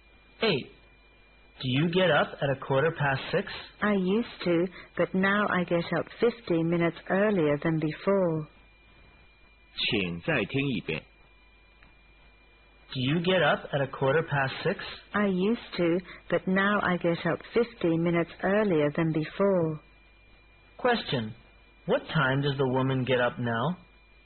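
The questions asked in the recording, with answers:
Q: What time does the woman get up now?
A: At 6:00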